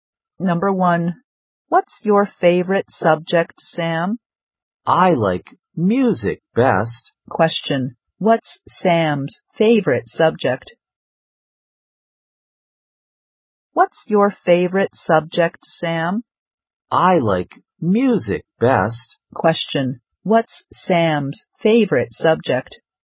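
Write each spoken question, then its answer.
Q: Question, what's Sam's favorite subject?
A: Music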